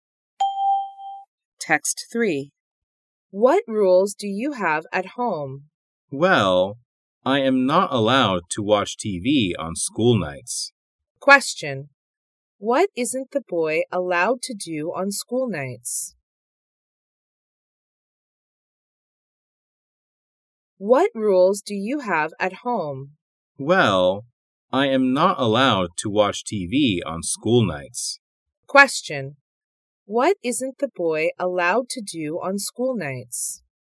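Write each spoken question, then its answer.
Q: What isn't the boy allowed to do on school nights?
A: Watch TV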